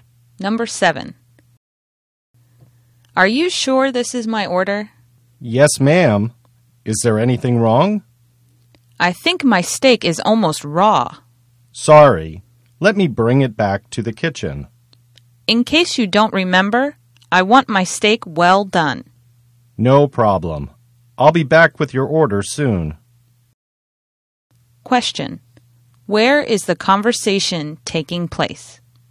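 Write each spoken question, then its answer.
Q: Question. Where is the conversation taking place?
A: At a restaurant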